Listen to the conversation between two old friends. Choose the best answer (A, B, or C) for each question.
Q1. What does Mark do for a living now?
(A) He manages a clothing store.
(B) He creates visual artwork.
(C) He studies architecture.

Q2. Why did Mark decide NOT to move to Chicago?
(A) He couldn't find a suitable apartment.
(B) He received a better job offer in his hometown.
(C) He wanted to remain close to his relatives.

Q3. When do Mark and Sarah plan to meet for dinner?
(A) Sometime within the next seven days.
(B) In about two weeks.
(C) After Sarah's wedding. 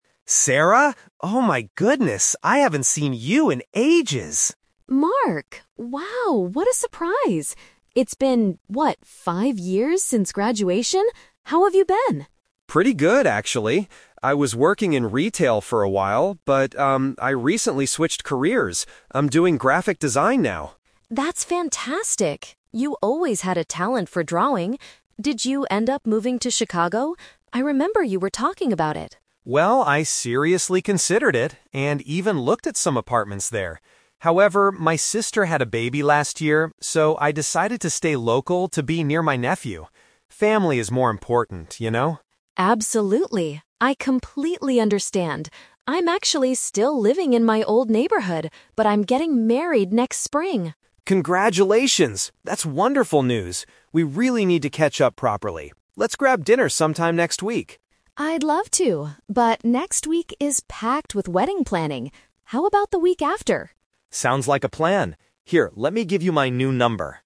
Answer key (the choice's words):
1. He creates visual artwork.
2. He wanted to remain close to his relatives.
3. In about two weeks.

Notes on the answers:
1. Mark says he is "doing graphic design now," which means he creates visual artwork.
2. Mark explains that his sister had a baby, so he decided to "stay local to be near my nephew." This matches the meaning of remaining close to relatives.
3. Mark suggests meeting "next week," but Sarah is busy and suggests "the week after" (which means in two weeks). Mark agrees by saying "Sounds like a plan."

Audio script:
Mark: Sarah? Oh my goodness, I haven't seen you in ages!
Sarah: Mark! Wow, what a surprise. It's been, what, five years since graduation? How have you been?
Mark: Pretty good, actually. I was working in retail for a while, but, um, I recently switched careers. I'm doing graphic design now.
Sarah: That's fantastic! You always had a talent for drawing. Did you end up moving to Chicago? I remember you were talking about it.
Mark: Well, I seriously considered it, and even looked at some apartments there. However, my sister had a baby last year, so I decided to stay local to be near my nephew. Family is more important, you know?
Sarah: Absolutely. I completely understand. I'm actually still living in my old neighborhood, but I'm getting married next spring!
Mark: Congratulations! That's wonderful news. We really need to catch up properly. Let's grab dinner sometime next week.
Sarah: I'd love to, but next week is packed with wedding planning.